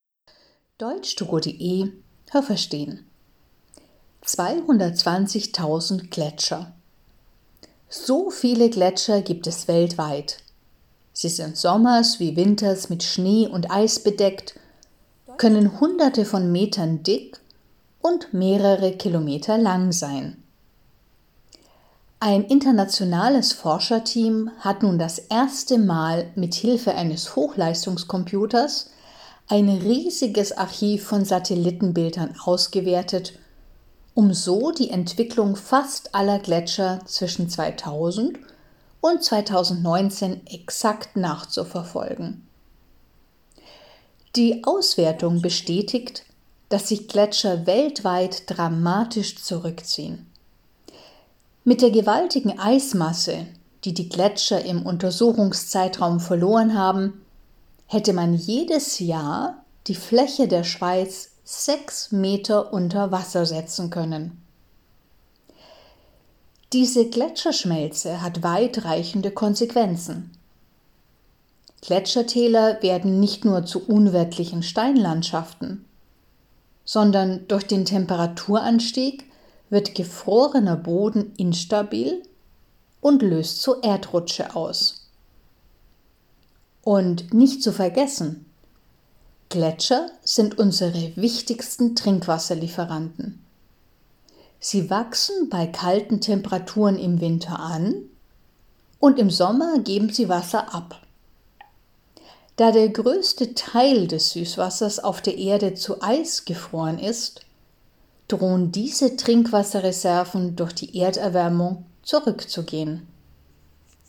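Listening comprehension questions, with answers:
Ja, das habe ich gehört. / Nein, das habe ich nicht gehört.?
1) Gletscher können Hunderte von Kilometern dick sein.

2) Man hat auch im letzten Jahrhundert schon über einen längeren Zeitraum Satellitenbilder von Gletschern weltweit ausgewertet.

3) Gletscher auf der ganzen Welt schrumpfen.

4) Mit dem Wasser, das die Gletscher zwischen 2000 und 2019 verloren haben, hätte man jedes Jahr die Schweiz sechs Zentimeter unter Wasser setzen können.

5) Wenn die Gletscher schmelzen, dann verändert sich die Landschaft.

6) Wenn die Gletscher schmelzen, dann kann es passieren, dass große Erdmassen nach unten rutschen.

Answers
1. Nein, das habe ich nicht gehört.
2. Nein, das habe ich nicht gehört.
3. Ja, das habe ich gehört.
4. Nein, das habe ich nicht gehört.
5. Ja, das habe ich gehört.
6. Ja, das habe ich gehört.

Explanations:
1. Sie können Hunderte von Metern dick, aber mehrere Kilometer lang sein.
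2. Man hat das zum ersten Mal für den Zeitraum 2000 bis 2019 gemacht.
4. Nicht sechs Zentimeter, sondern sechs Meter.

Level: B2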